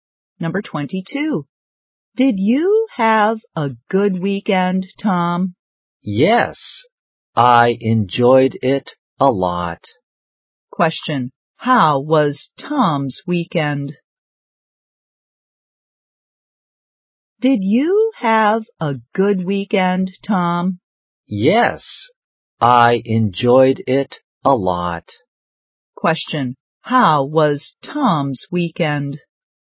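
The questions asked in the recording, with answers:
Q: How was Tom's weekend?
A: Good; he enjoyed it a lot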